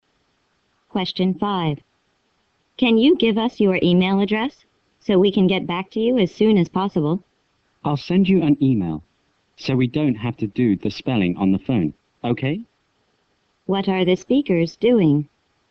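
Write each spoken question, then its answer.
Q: What are the speakers doing?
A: Talking on the phone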